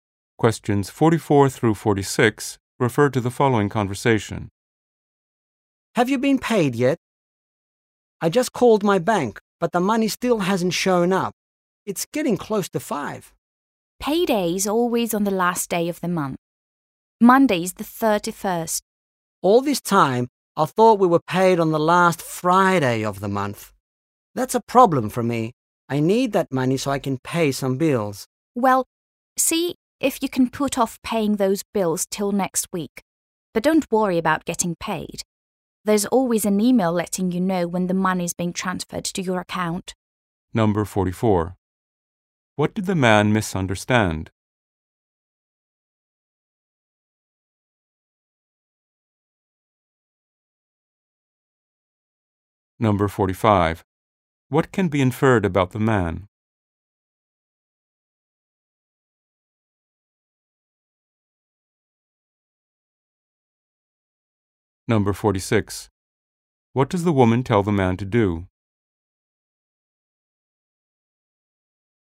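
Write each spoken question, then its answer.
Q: What did the man misunderstand?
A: When payday is

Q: What can be inferred about the man?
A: He needs the money to pay bills

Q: What does the woman tell the man to do?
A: Put off paying his bills until next week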